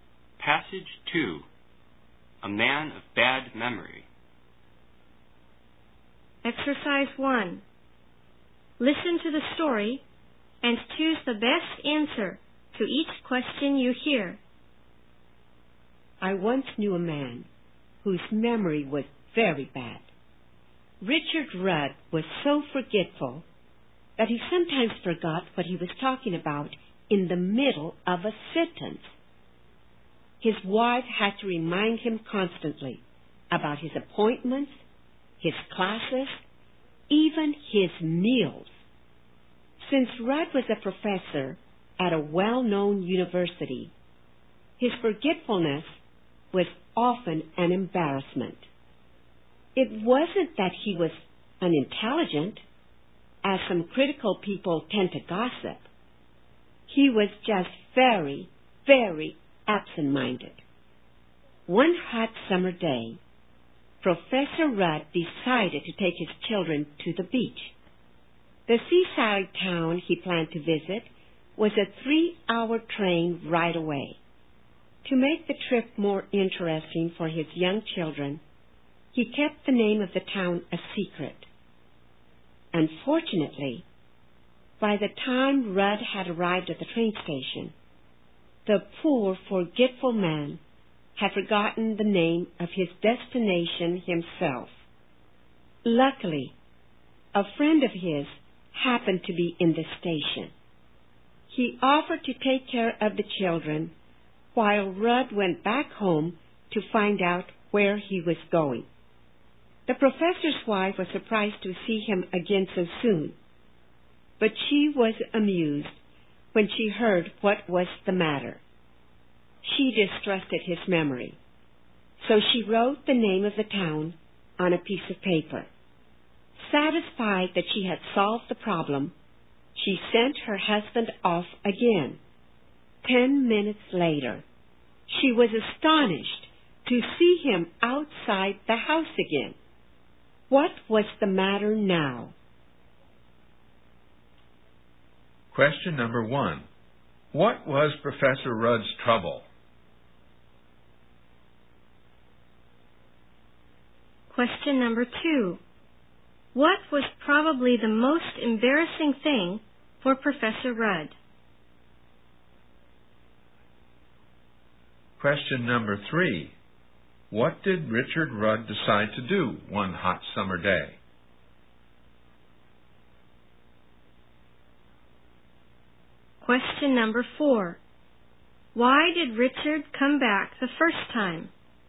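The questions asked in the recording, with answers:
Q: What was Professor Rudd's trouble?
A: He had a very bad memory

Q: What did Richard Rudd decide to do one hot summer day?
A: Take his children to the beach

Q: Why did Richard come back the first time?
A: He had forgotten the name of the town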